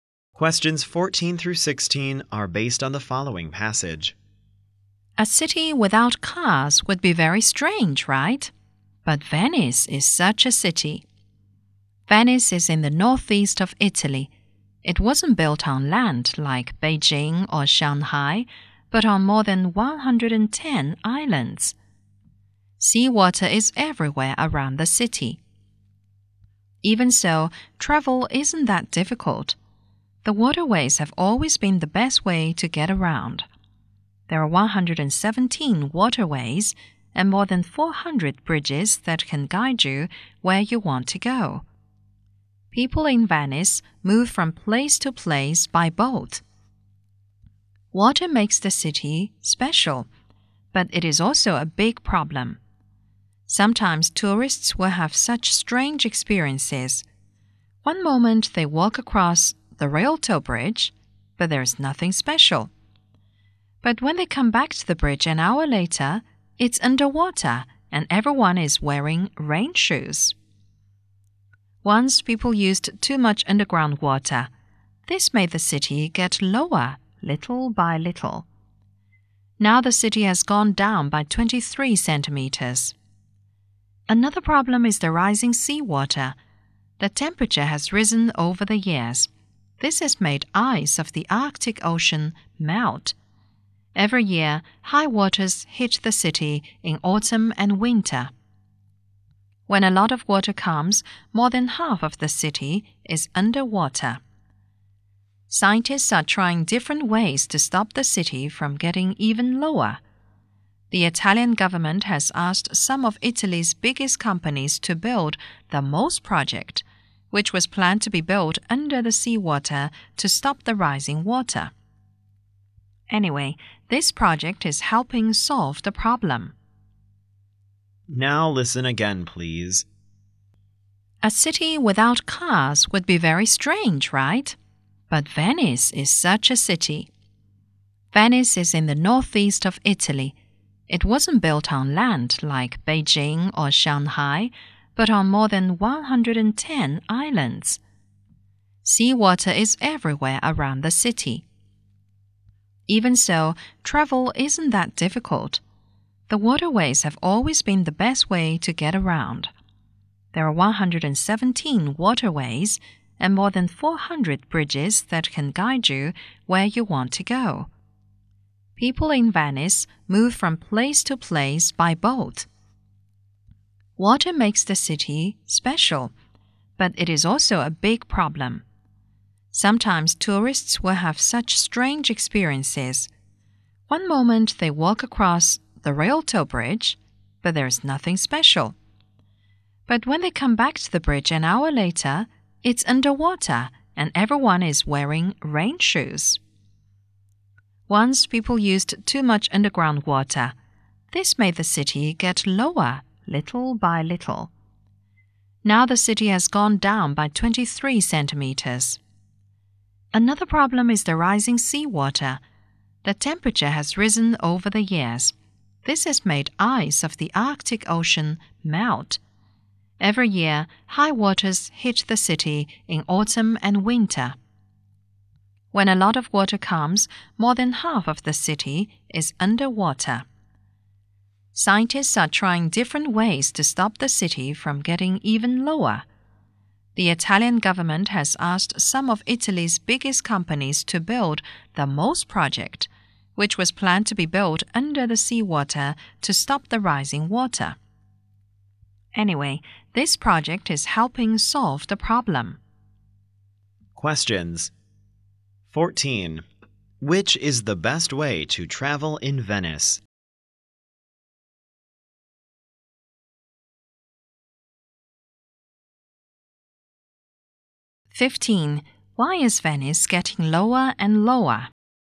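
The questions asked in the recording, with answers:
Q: Which is the best way to travel in Venice?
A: By boat

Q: Why is Venice getting lower and lower?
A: People used too much underground water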